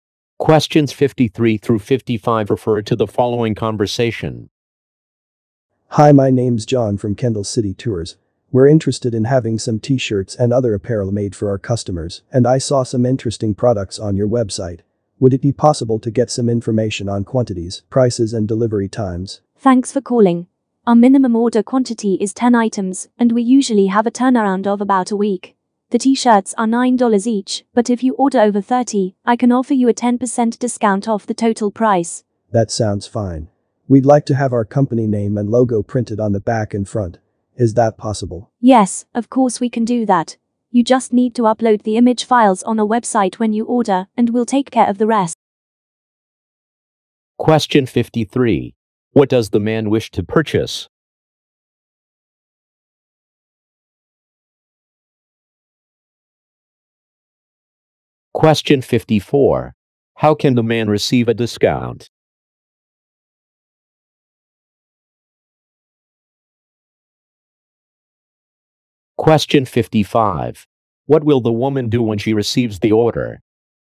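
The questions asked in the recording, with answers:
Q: What does the man wish to purchase?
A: T-shirts / apparel

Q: How can the man receive a discount?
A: By ordering over 30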